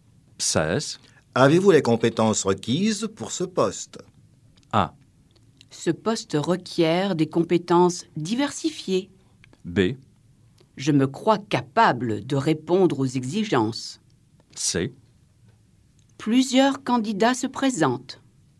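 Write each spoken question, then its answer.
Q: Avez-vous les compétences requises pour ce poste?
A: B: Je me crois capable de répondre aux exigences.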